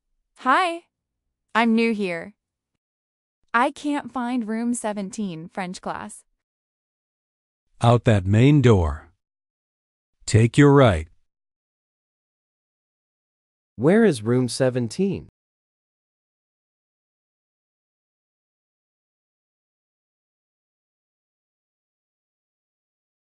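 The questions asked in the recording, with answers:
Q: Where is room 17?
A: Out the main door, to the right.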